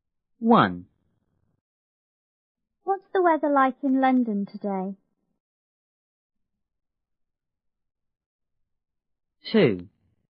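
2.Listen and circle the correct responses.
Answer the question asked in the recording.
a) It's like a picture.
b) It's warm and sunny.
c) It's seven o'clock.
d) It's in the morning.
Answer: b) It's warm and sunny.

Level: 六年级下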